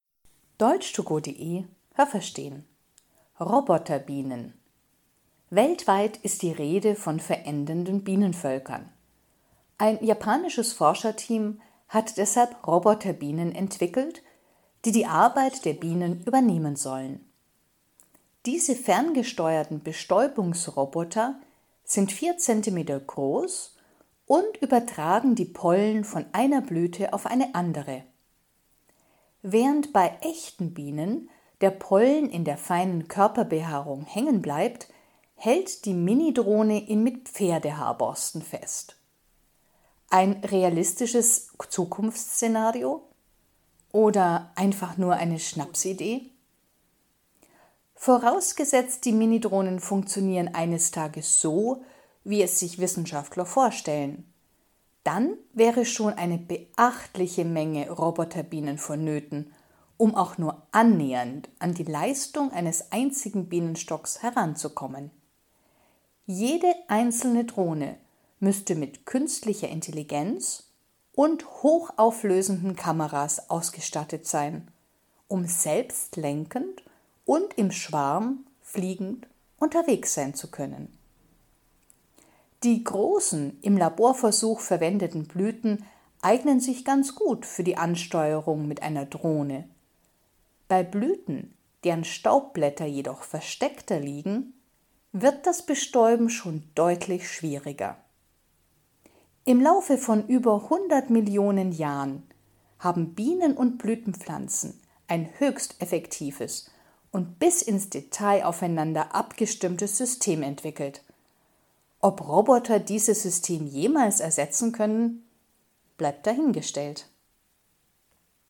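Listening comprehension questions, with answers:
Haben Sie das gehört? Stimmt diese Aussage?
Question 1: Vier Zentimeter große Roboterbienen sollen das Problem des Bienensterbens lösen.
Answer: richtig

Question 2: Wie bei den echten Bienen übertragen die Roboterbienen den Blütenstaub mittels Körperbehaarung.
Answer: falsch

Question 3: Es genügen schon wenige Roboterbienen, um die Arbeit eines Bienenstocks zu bewältigen.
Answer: falsch

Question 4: Jede Roboterbiene muss über künstliche Intelligenz und über eine Kamera verfügen, die gestochen scharfe Bilder erstellt.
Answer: richtig

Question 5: Die Roboterbienen, mit denen man im Labor experimentierte, können bei allen Blüten zum Einsatz kommen.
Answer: falsch

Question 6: Das System, das Bienen und Blütenpflanzen entwickelt haben, funktioniert schon seit über 100 Billionen Jahren.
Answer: falsch

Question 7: Wenn man bei den Roboterbienen noch einige Details im System verbessert, können sie jederzeit die Bienen ersetzen.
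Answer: falsch

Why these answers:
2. Roboterbienen übertragen die Pollen mittels Pferdehaarborsten.
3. Man benötigt eine große Menge Roboterbienen.
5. Wenn die Staubblätter versteckter liegen, gibt es Probleme.
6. Es funktioniert schon seit 100 Millionen Jahren.
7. Ob die Roboterbienen die echten Bienen jemals ersetzen können, ist fraglich.

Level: C (schwer)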